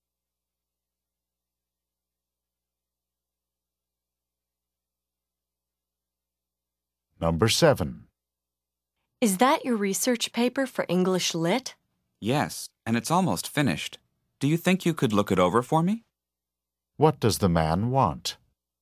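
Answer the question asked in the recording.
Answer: For the woman to look over his research paper.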